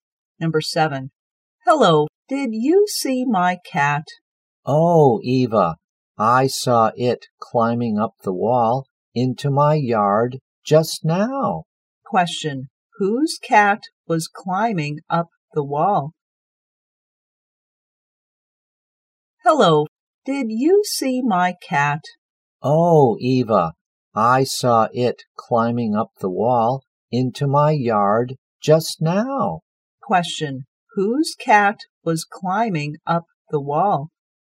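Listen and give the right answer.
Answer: Eva's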